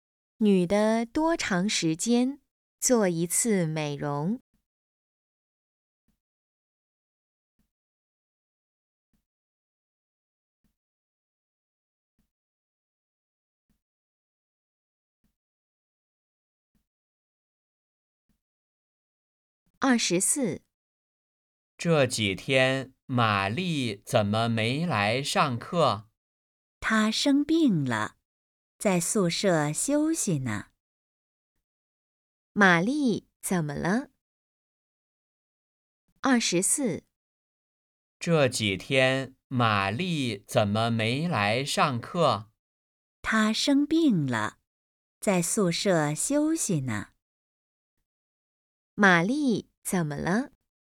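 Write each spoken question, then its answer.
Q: 玛丽怎么了?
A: 生病了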